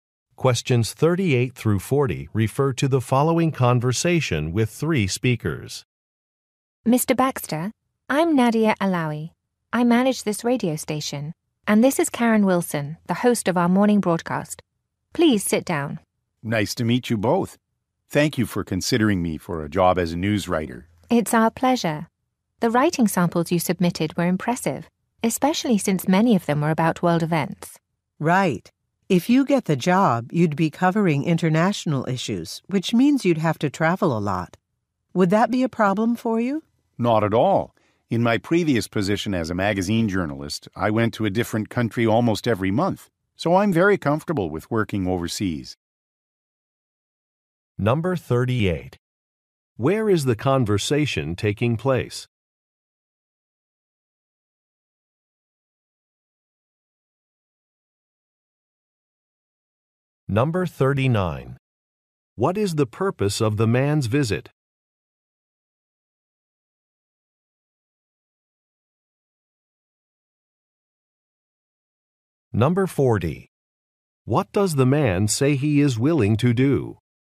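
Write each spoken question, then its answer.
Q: Where is the conversation taking place?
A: At a radio station

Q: What is the purpose of the man's visit?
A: A job interview for a news writer position

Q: What does the man say he is willing to do?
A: Travel internationally often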